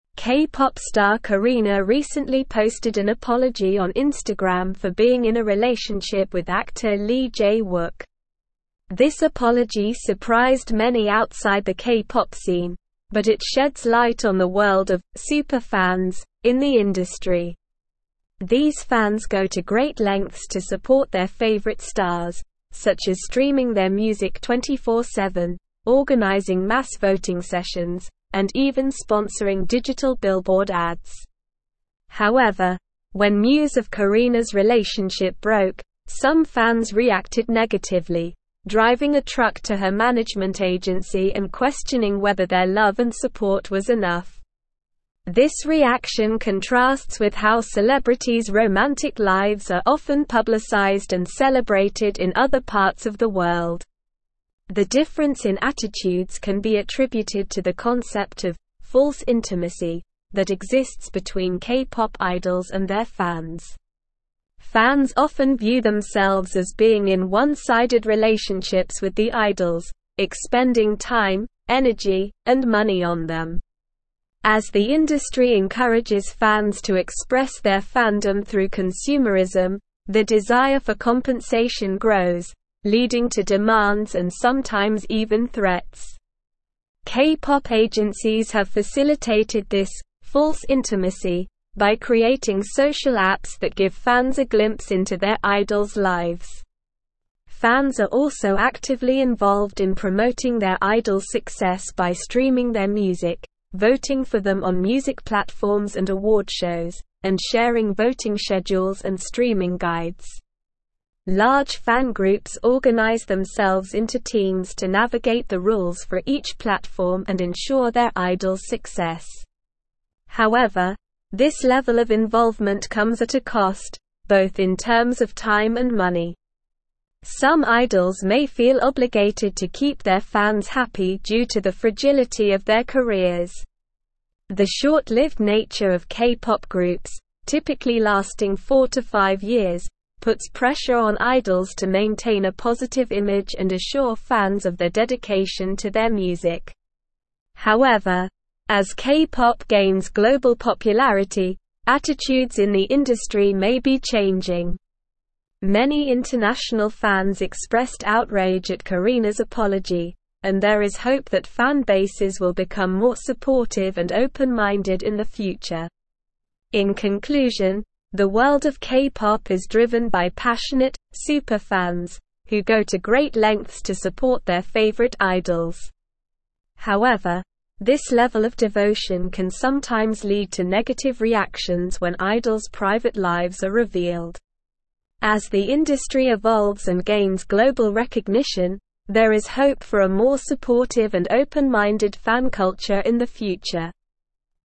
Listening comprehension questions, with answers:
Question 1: but it sheds light on the world of "super fans" in the (1)______.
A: industry

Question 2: organizing mass voting (2)______,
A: sessions

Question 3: and even sponsoring digital (3)______ ads.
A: billboard

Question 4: driving a truck to her management agency and (4)______ whether their love and support was enough.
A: questioning

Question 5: This reaction contrasts with how celebrities' romantic (5)______ are often publicized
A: lives

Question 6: celebrated in other parts of the (6)______.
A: world

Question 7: their (7)______ for (8)______ grows,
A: desire

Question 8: their (7)______ for (8)______ grows,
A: compensation

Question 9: Fans are also actively involved in promoting their idols' (9)______ by streaming their music,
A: success

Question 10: navigate the rules for each platform and (10)______ their idols' success.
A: ensure

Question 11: typically (11)______ four to five (12)______,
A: lasting

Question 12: typically (11)______ four to five (12)______,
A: years

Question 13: there is hope that fan bases will become more (13)______ive and open-minded in the (14)______.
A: support

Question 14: there is hope that fan bases will become more (13)______ive and open-minded in the (14)______.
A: future

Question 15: go to great lengths to support their (15)______ idols.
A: favorite

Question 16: As the industry evolves and gains global (16)______,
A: recognition

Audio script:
K-pop star Karina recently posted an apology on Instagram for being in a relationship with actor Lee Jae-wook. This apology surprised many outside the K-pop scene, but it sheds light on the world of "super fans" in the industry. These fans go to great lengths to support their favorite stars, such as streaming their music 24/7, organizing mass voting sessions, and even sponsoring digital billboard ads. However, when news of Karina's relationship broke, some fans reacted negatively, driving a truck to her management agency and questioning whether their love and support was enough.
This reaction contrasts with how celebrities' romantic lives are often publicized and celebrated in other parts of the world. The difference in attitudes can be attributed to the concept of "false intimacy" that exists between K-pop idols and their fans. Fans often view themselves as being in one-sided relationships with the idols, expending time, energy, and money on them. As the industry encourages fans to express their fandom through consumerism, their desire for compensation grows, leading to demands and sometimes even threats.
K-pop agencies have facilitated this "false intimacy" by creating social apps that give fans a glimpse into their idols' lives. Fans are also actively involved in promoting their idols' success by streaming their music, voting for them on music platforms and award shows, and sharing voting schedules and streaming guides. Large fan groups organize themselves into teams to navigate the rules for each platform and ensure their idols' success. However, this level of involvement comes at a cost, both in terms of time and money.
Some idols may feel obligated to keep their fans happy due to the fragility of their careers. The short-lived nature of K-pop groups, typically lasting four to five years, puts pressure on idols to maintain a positive image and assure fans of their dedication to their music. However, as K-pop gains global popularity, attitudes in the industry may be changing. Many international fans expressed outrage at Karina's apology, and there is hope that fan bases will become more supportive and open-minded in the future.
In conclusion, the world of K-pop is driven by passionate "super fans" who go to great lengths to support their favorite idols. However, this level of devotion can sometimes lead to negative reactions when idols' private lives are revealed. As the industry evolves and gains global recognition, there is hope for a more supportive and open-minded fan culture in the future.

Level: Level 4